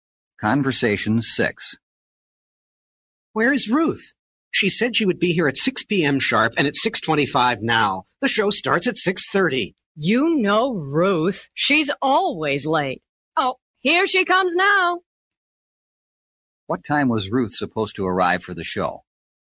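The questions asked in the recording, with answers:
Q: What time was Ruth supposed to arrive for the show?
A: 6 p.m.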